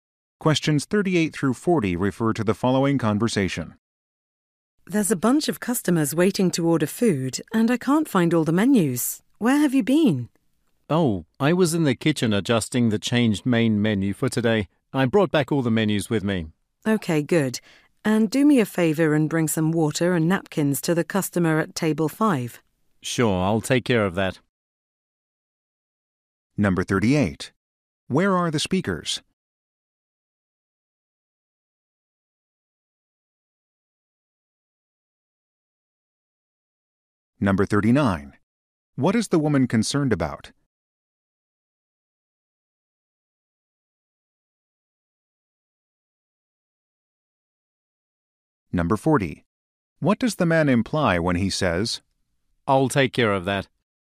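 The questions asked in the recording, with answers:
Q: Where are the speakers?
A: In a restaurant

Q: What is the woman concerned about?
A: Customers waiting to order and missing menus

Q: What does the man imply when he says,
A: He will bring water and napkins to table 5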